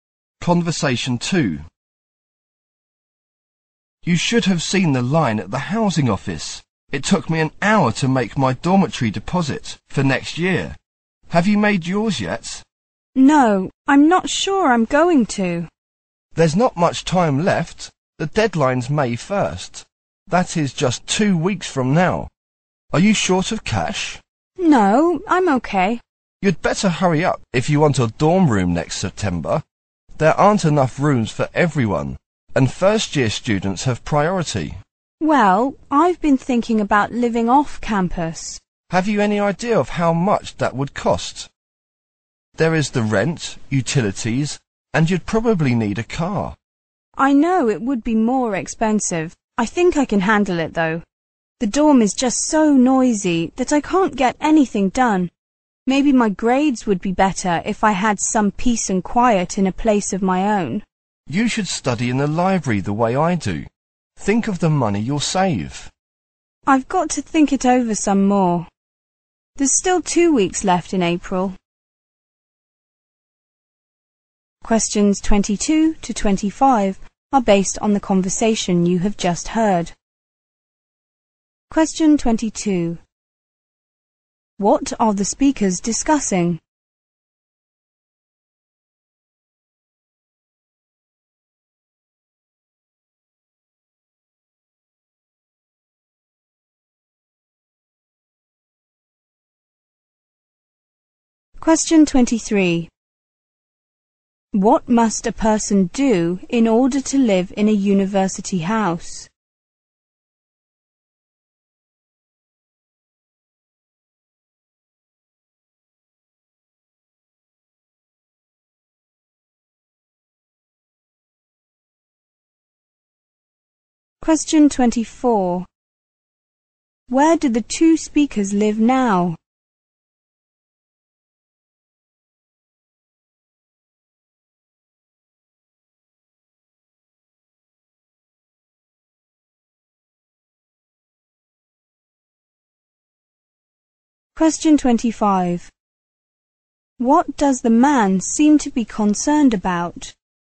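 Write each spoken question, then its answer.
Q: What are the speakers discussing?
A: Whether the man should live in a dorm or off campus next year.

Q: What must a person do in order to live in a university house?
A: Pay a dormitory deposit by May 1st.

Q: Where do the two speakers live now?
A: In a dormitory on campus.

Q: What does the man seem to be concerned about?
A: The noise in the dorm hurting his studies and grades.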